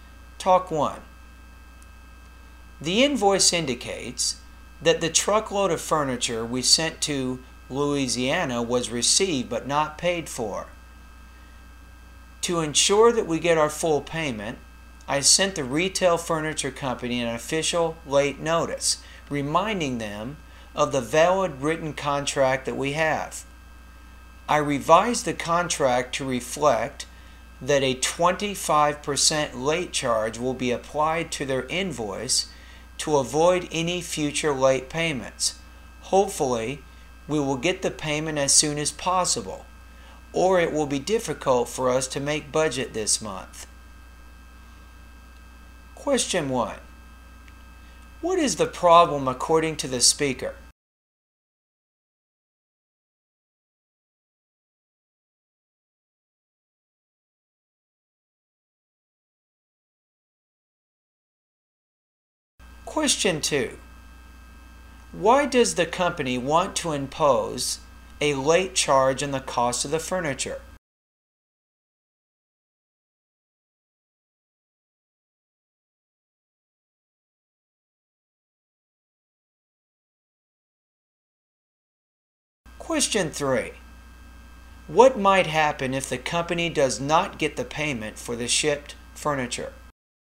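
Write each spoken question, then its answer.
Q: What is the problem according to the speaker?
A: The furniture was received but not paid for.

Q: Why does the company want to impose a late charge on the cost of the furniture?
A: To avoid any future late payments.

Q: What might happen if the company does not get the payment for the shipped furniture?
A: It will be difficult to make budget this month.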